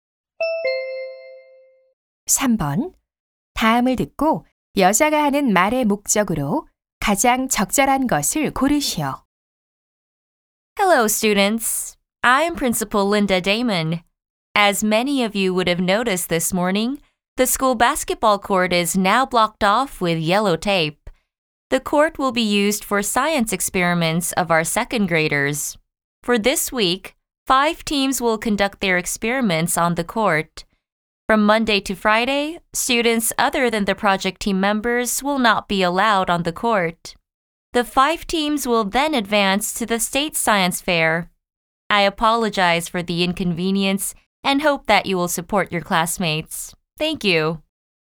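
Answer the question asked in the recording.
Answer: 과학 실험을 위해 학교 농구장 사용이 이번 주 제한됨을 알리려고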